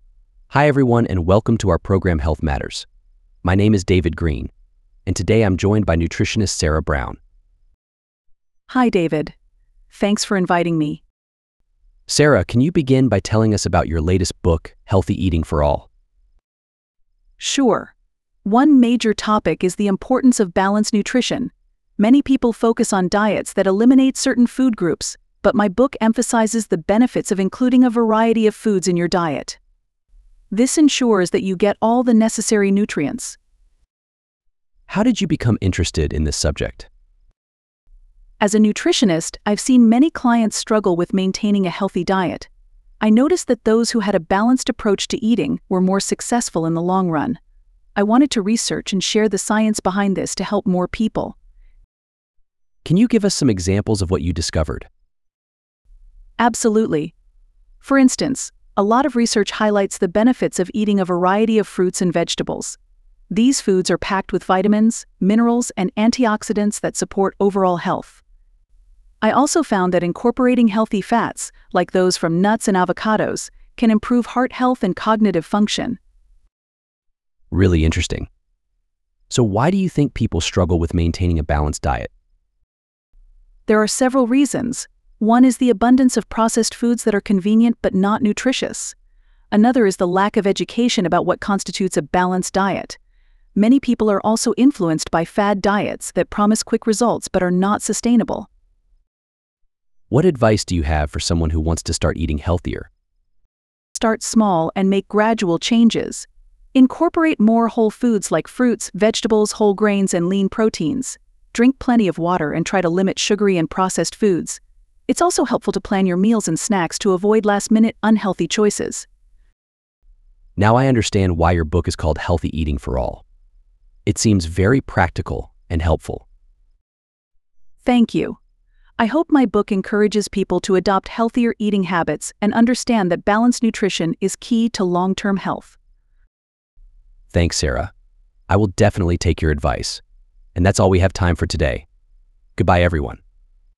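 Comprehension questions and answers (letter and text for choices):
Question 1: What does Sarah say about balanced nutrition?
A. It requires eliminating certain food groups.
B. It includes a variety of foods.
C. It is only for people with health issues.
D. It is difficult to maintain.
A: B. It includes a variety of foods.

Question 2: What does Sarah say about her clients?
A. They often struggle with maintaining a healthy diet.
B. They always follow her advice perfectly.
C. They prefer diets that eliminate food groups.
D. They do not need guidance on nutrition.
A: A. They often struggle with maintaining a healthy diet.

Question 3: A balanced diet ensures that .......................................................... .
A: you get all the necessary nutrients

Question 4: What did Sarah discover that motivated her to write the book? She discovered that (–).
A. clients were always successful with diets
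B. balanced diets lead to long-term success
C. people need more exercise than diet changes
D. eliminating food groups is beneficial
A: B. balanced diets lead to long-term success

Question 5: What does Sarah explain about including a variety of foods in your diet?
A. Who finds it the easiest to do.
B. Why it is important for getting necessary nutrients.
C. Why it can be challenging for some people.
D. Why she studied different diets.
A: B. Why it is important for getting necessary nutrients.

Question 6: Sarah hopes that her book will convince people to (–).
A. eliminate certain food groups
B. focus on balanced nutrition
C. ignore professional advice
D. eat more processed foods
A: B. focus on balanced nutrition

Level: שאלון E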